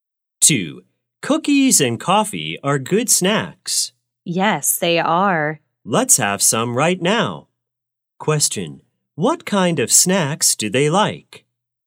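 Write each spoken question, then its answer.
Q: what kind of snacks do they like?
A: Cookies and coffee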